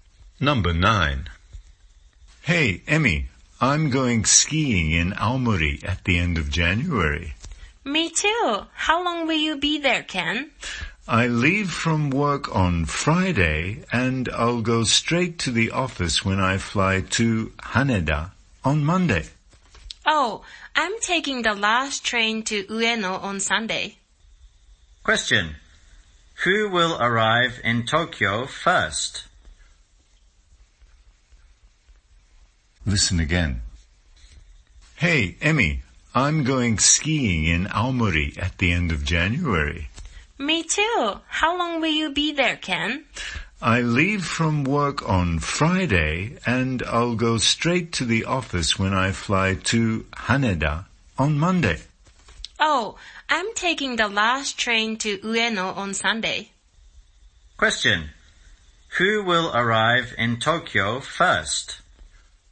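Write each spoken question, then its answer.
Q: Who will arrive in Tokyo first?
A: Emmy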